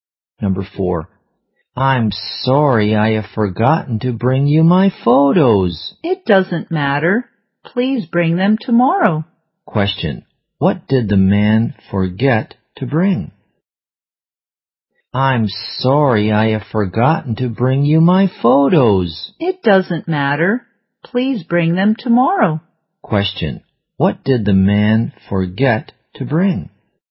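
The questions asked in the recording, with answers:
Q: Question, what did the man forget to bring?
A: His photos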